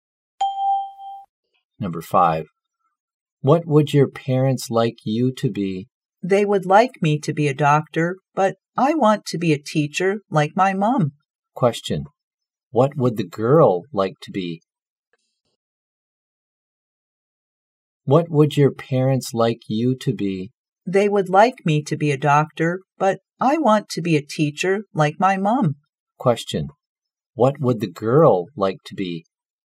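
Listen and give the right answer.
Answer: A teacher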